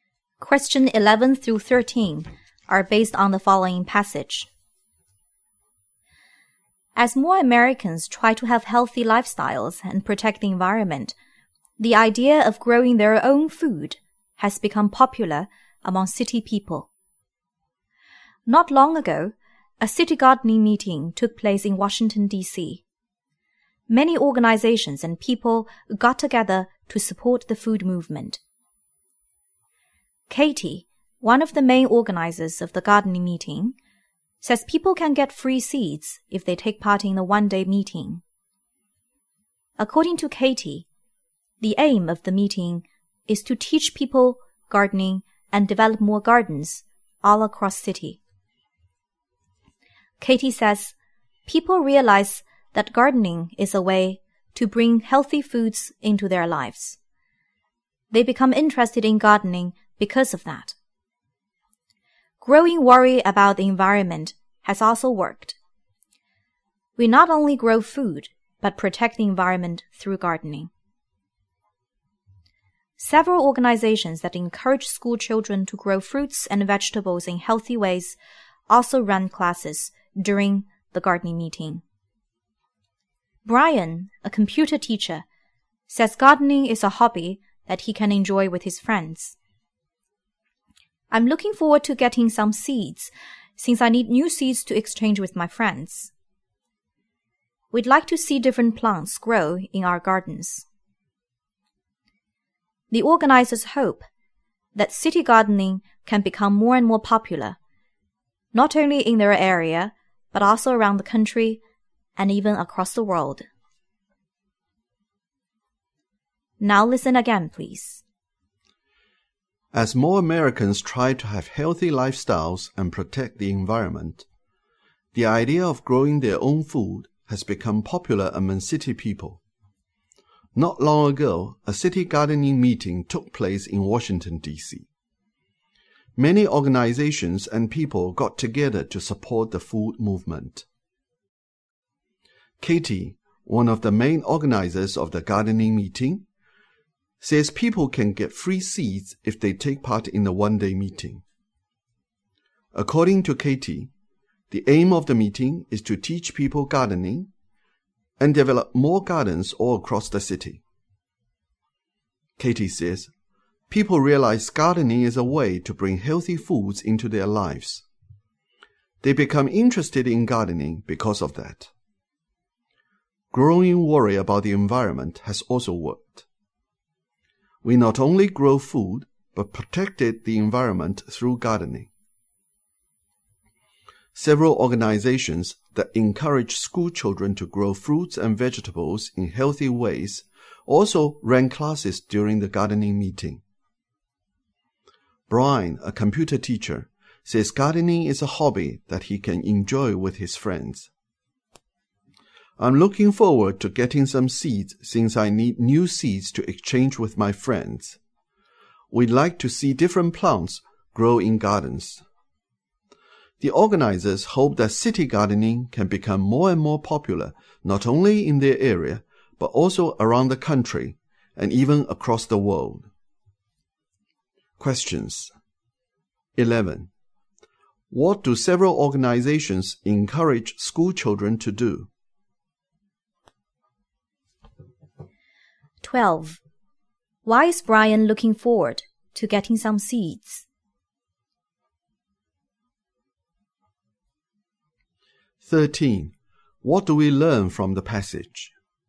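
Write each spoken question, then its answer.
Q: What do several organizations encourage school children to do?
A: Grow fruits and vegetables in healthy ways

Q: Why is Brian looking forward to getting some seeds?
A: To exchange them with his friends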